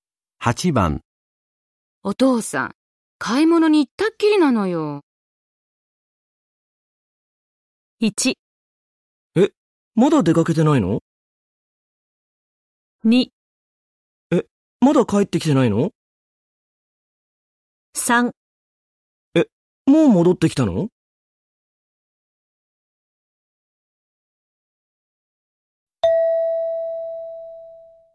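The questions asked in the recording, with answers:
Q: お父さん、買い物に行ったっきりなのよ。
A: 2: え、まだ帰ってきてないの?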